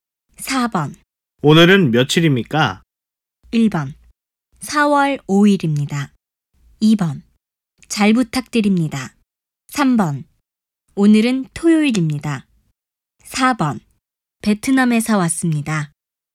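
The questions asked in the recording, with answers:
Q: 오늘은 며칠입니까?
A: 1: 4월 5일입니다.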